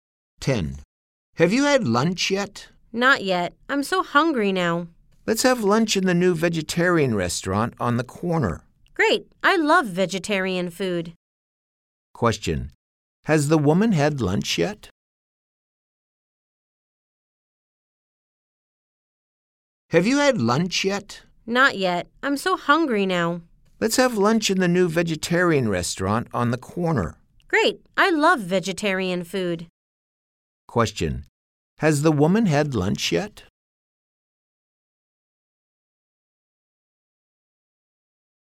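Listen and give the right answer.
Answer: No, she hasn't.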